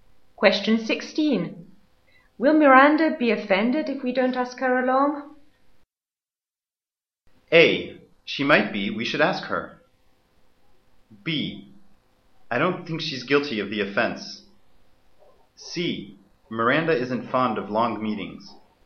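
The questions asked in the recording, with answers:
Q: Will Miranda be offended if we don't ask her along?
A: A: She might be. We should ask her.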